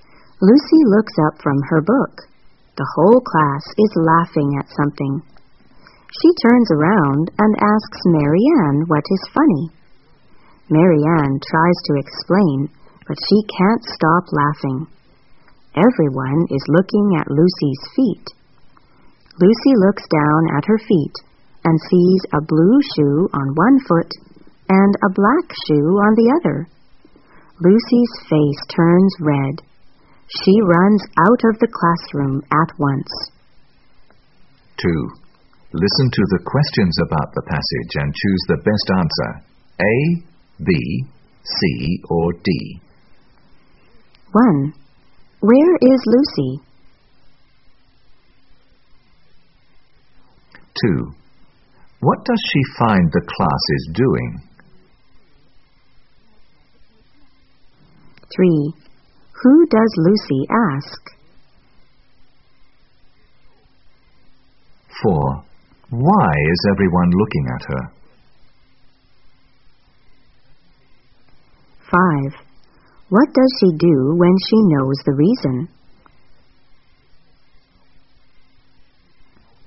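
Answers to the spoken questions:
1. In the classroom
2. Laughing at something
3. Marianne
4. She is wearing a blue shoe and a black shoe
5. She runs out of the classroom at once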